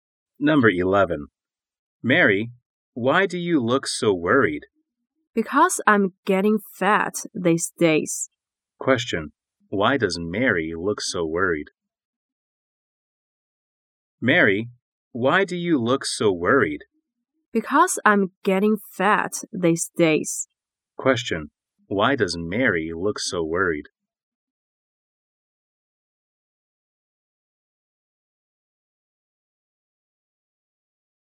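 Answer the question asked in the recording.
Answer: Because she is getting fat these days.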